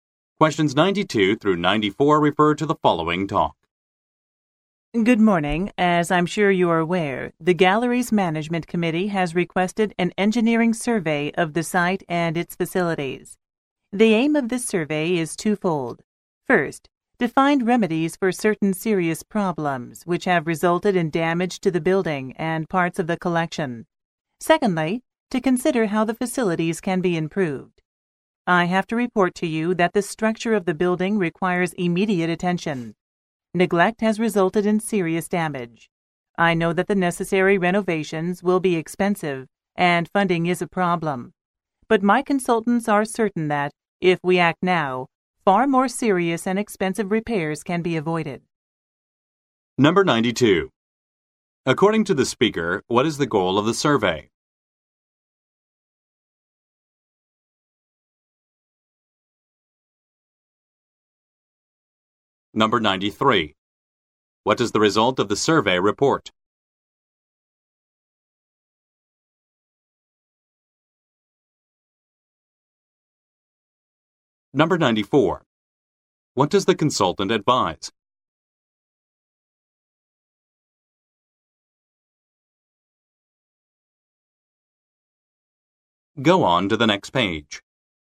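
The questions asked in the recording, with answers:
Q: According to the speaker, what is the goal of the survey?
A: To find remedies for the damage and consider how to improve the facilities

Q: What does the result of the survey report?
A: The building's structure needs immediate attention

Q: What does the consultant advise?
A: Acting now to avoid more serious and expensive repairs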